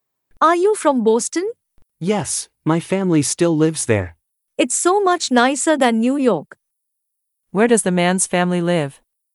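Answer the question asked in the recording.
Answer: Boston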